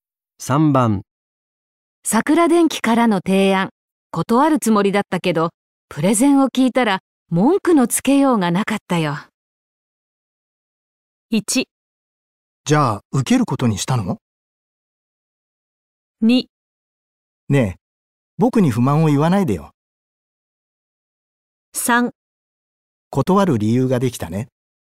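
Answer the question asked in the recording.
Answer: 1: じゃあ受けることにしたの?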